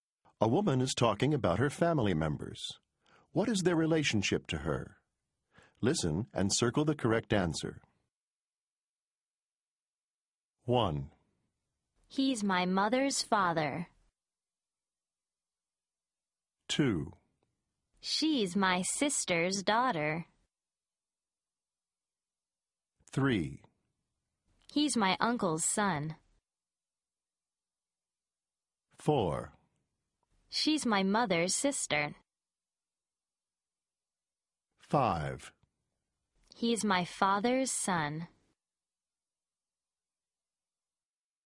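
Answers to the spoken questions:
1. grandfather
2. niece
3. cousin
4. aunt
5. brother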